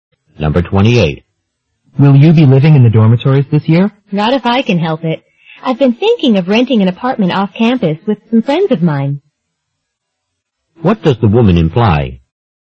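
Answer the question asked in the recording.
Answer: She hopes to live in an apartment off campus, not the dorms.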